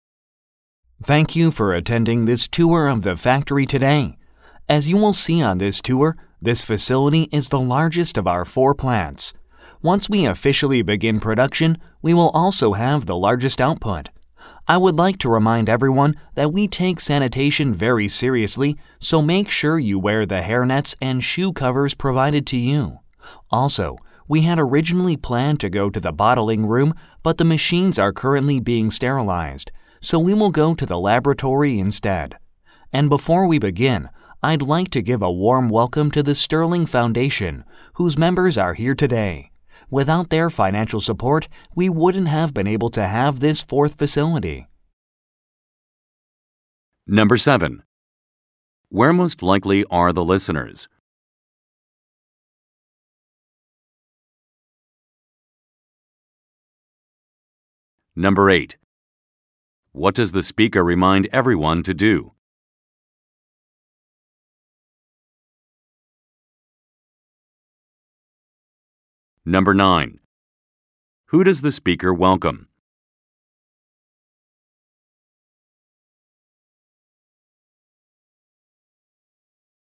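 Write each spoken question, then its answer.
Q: Where most likely are the listeners?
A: At a factory

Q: What does the speaker remind everyone to do?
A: Wear hairnets and shoe covers

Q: Who does the speaker welcome?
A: Members of the Sterling Foundation, who gave financial support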